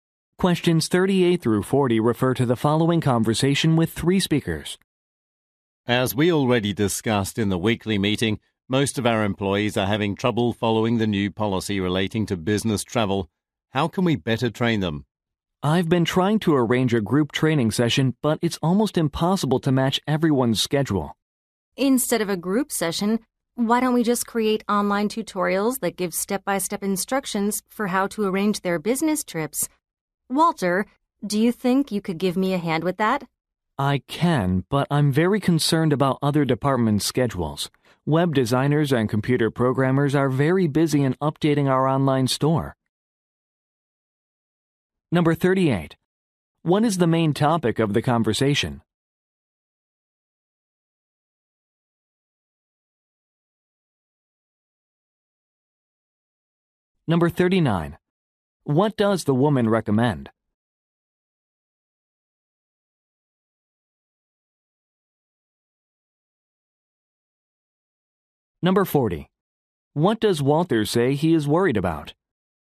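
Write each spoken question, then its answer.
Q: What is the main topic of the conversation?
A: Training employees on the new business travel policy

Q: What does the woman recommend?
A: Creating online tutorials

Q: What does Walter say he is worried about?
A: Other departments' busy schedules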